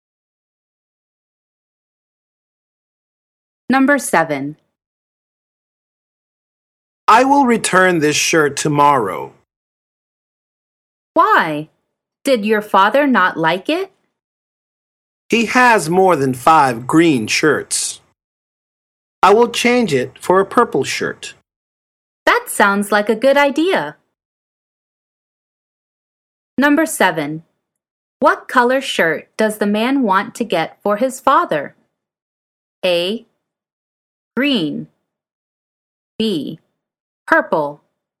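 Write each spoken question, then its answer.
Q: What color shirt does the man want to get for his father?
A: B: Purple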